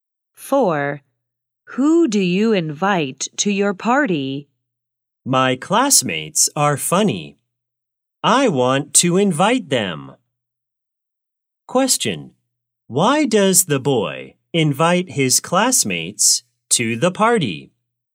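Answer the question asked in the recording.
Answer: Because they are funny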